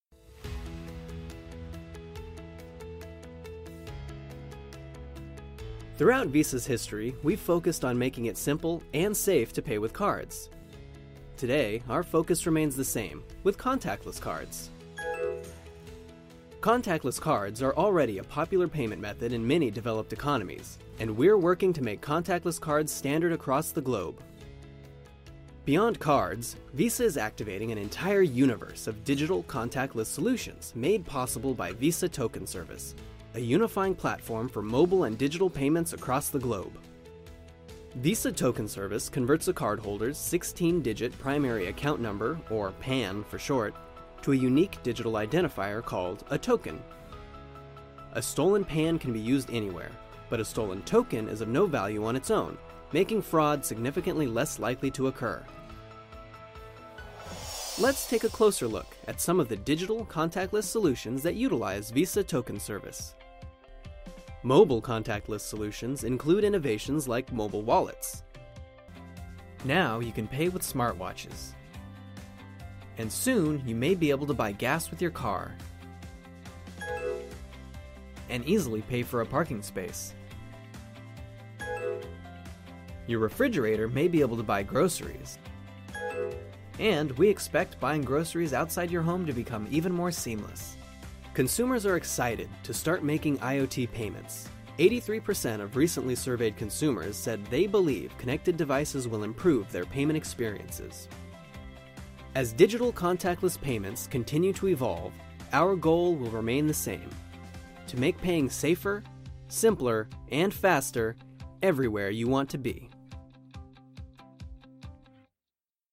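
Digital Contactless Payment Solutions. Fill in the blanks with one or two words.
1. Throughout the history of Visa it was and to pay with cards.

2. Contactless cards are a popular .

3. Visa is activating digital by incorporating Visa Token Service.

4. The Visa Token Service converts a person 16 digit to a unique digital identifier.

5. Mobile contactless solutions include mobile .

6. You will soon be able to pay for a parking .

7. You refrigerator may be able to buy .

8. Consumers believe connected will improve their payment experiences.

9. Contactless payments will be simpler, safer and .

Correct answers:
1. simple, safe
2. payment method
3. contactless solutions
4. primary account number
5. wallets
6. space
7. groceries
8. devices
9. faster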